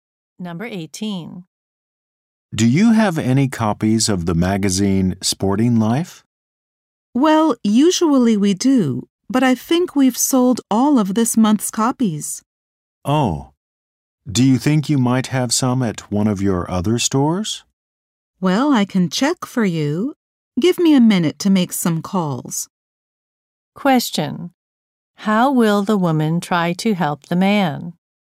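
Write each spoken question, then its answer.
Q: How will the woman try to help the man?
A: She will call other stores to see if they have the magazine.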